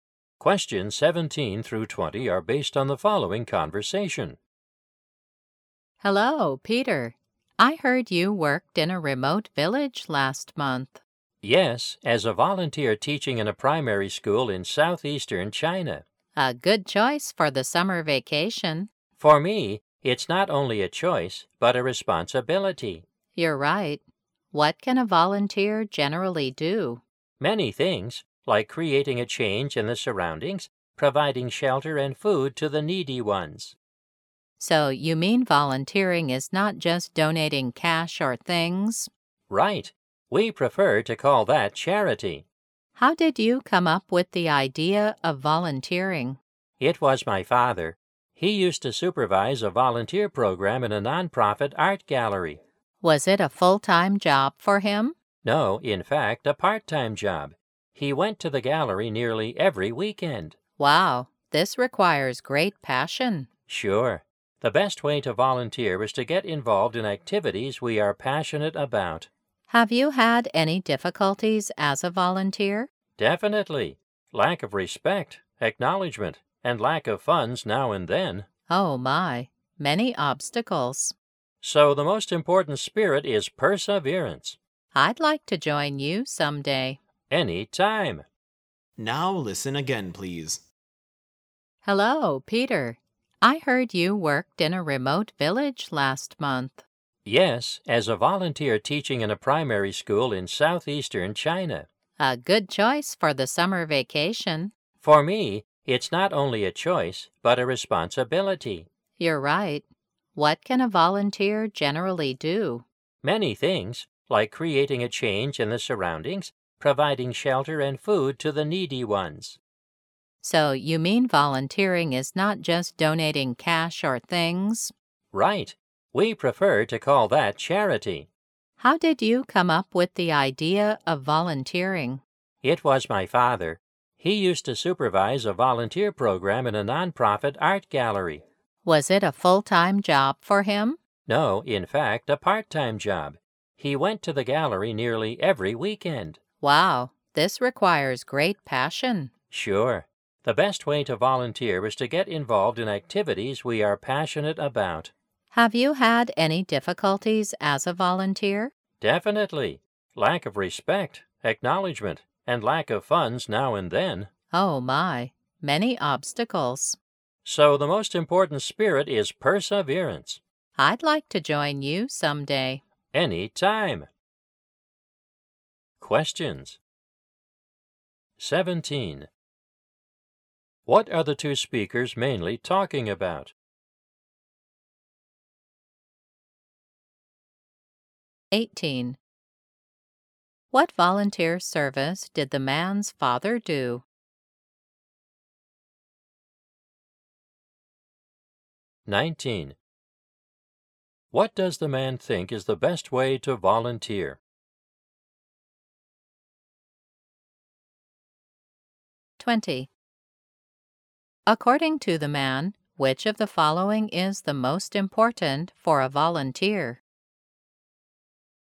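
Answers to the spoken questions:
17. Volunteering
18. He supervised a volunteer program in a nonprofit art gallery
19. Getting involved in activities you are passionate about
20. Perseverance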